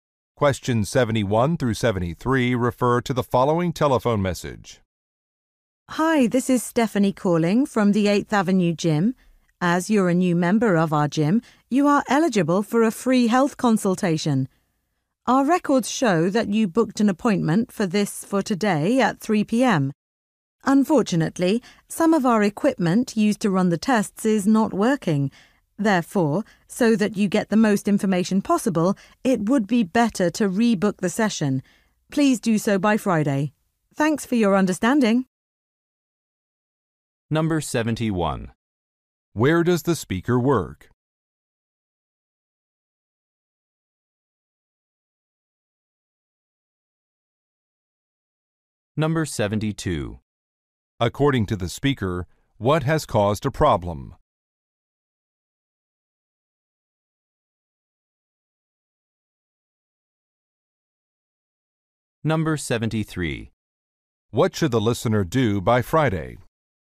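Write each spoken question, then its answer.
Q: Where does the speaker work?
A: At a gym (8th Avenue Gym)

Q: According to the speaker, what has caused a problem?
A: Some test equipment is not working

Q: What should the listener do by Friday?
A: Rebook the health consultation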